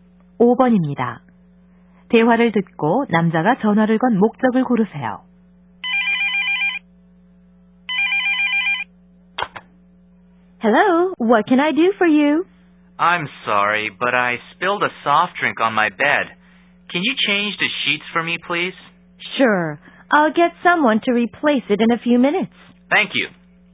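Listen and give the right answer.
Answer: 침대 시트 교체를 요청하려고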